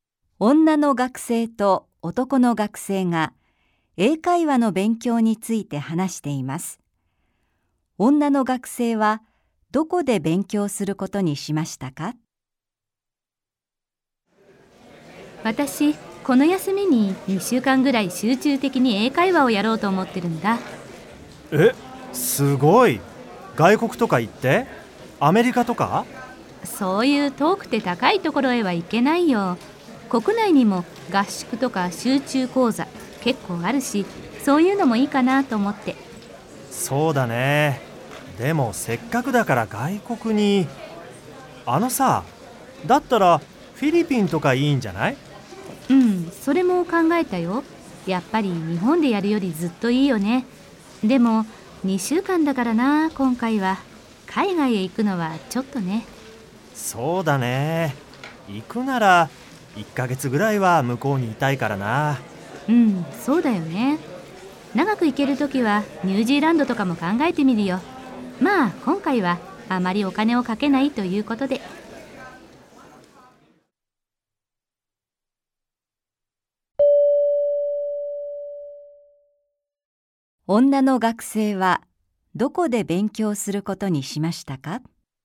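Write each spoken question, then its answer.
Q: 女の学生はどこで勉強することにしましたか?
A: 国内(日本)の合宿や集中講座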